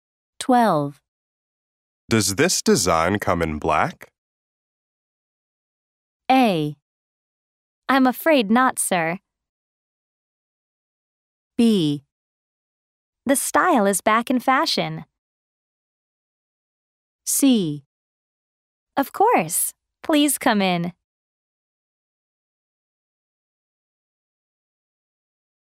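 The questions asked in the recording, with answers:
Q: Does this design come in black?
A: A: I'm afraid not, sir.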